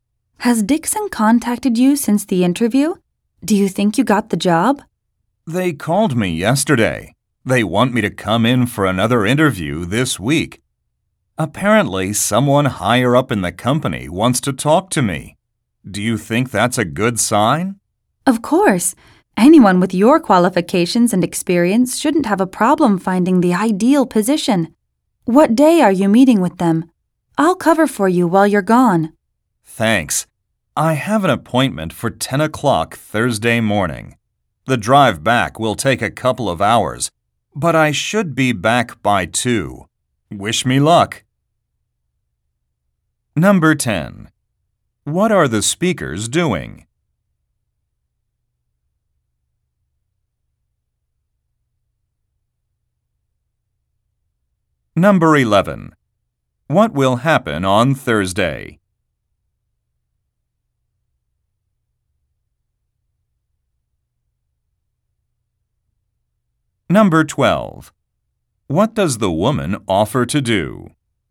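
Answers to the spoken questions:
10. Talking about a job interview
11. The man will have a second job interview
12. Cover for him while he's gone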